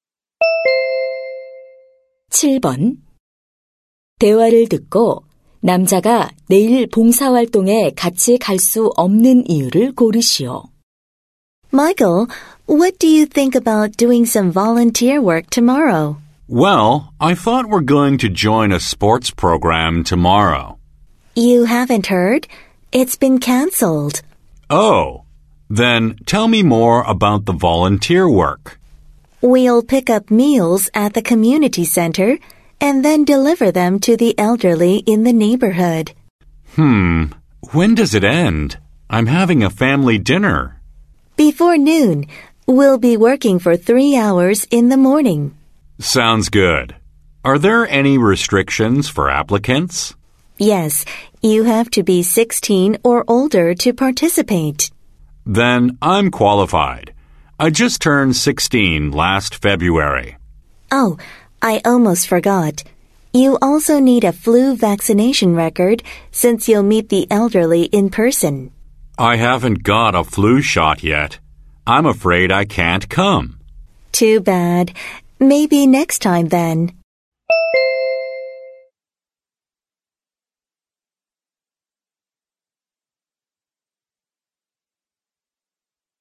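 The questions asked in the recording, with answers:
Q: 대화를 듣고 남자가 내일 봉사활동에 같이 갈 수 없는 이유를 고르시오.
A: 독감 예방 접종을 아직 맞지 않아서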